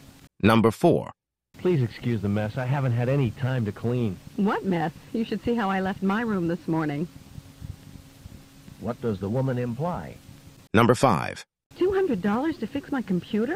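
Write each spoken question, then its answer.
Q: What does the woman imply?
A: Her room is messier; his place isn't messy.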